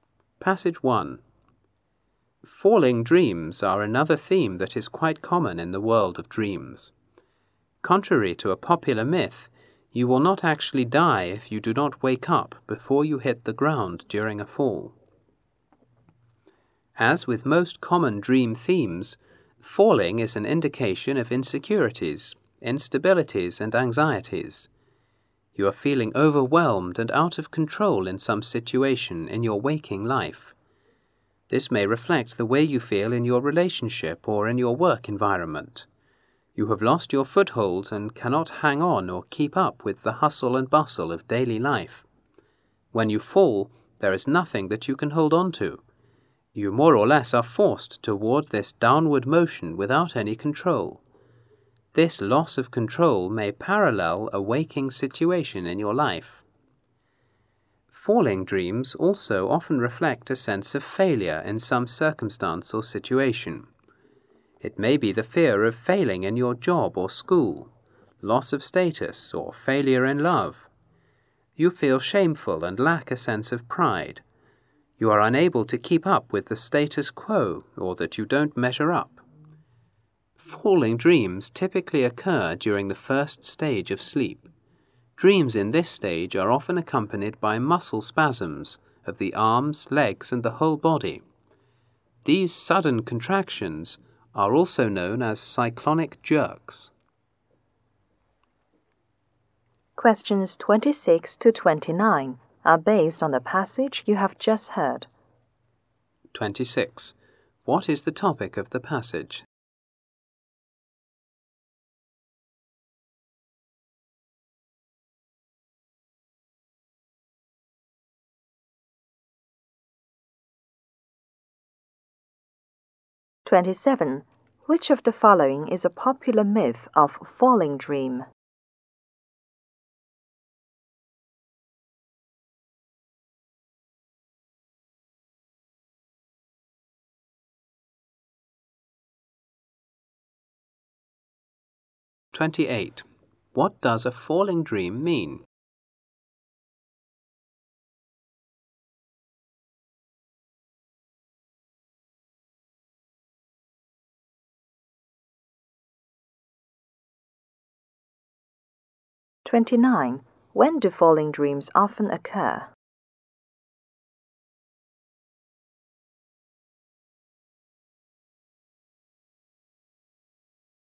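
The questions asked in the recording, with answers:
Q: What is the topic of the passage?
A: Falling dreams

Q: Which of the following is a popular myth of falling dream?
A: That you will die if you don't wake up before hitting the ground

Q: What does a falling dream mean?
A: Insecurity, instability and anxiety, or a sense of failure

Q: When do falling dreams often occur?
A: During the first stage of sleep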